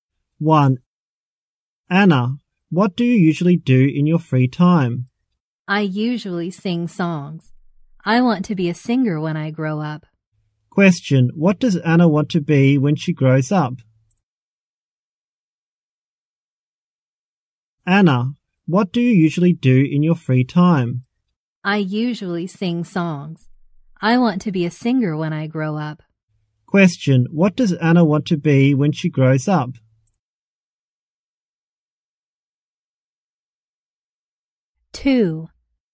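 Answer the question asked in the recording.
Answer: A singer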